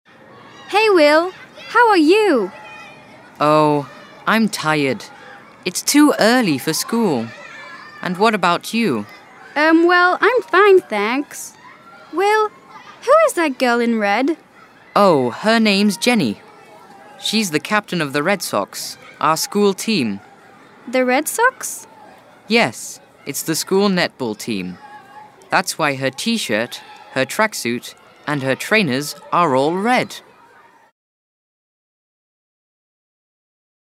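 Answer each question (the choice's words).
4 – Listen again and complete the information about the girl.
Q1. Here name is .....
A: Jenny

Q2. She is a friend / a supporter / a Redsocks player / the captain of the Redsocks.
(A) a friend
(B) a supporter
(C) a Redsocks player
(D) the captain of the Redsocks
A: the captain of the Redsocks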